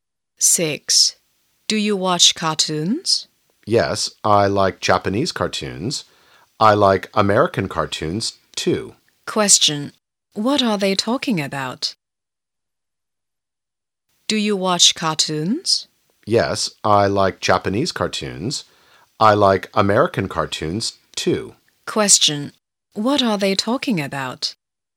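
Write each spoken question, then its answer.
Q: What are they talking about?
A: Cartoons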